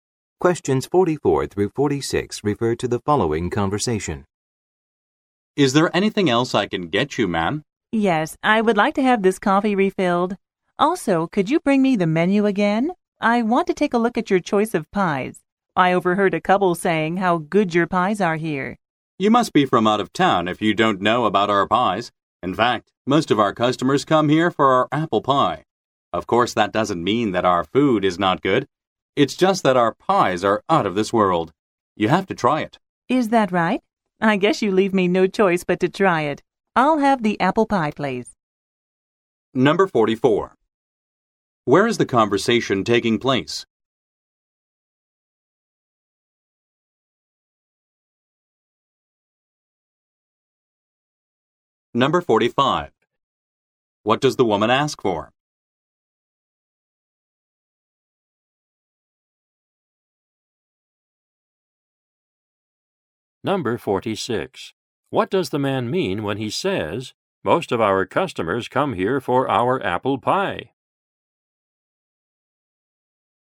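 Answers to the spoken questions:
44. At a restaurant
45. A coffee refill and the menu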